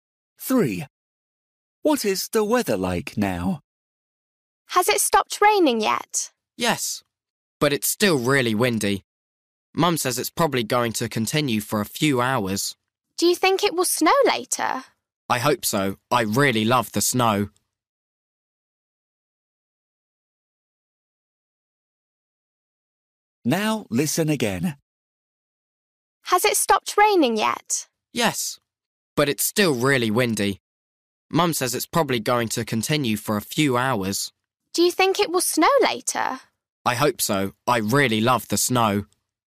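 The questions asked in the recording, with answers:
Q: What is the weather like now?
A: Windy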